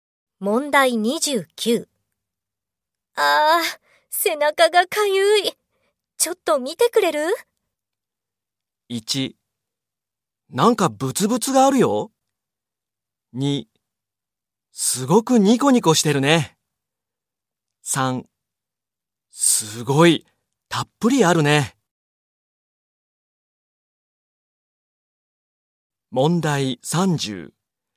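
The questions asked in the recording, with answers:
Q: ああ、背中がかゆい。ちょっと見てくれる?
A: 1: なんかブツブツがあるよ。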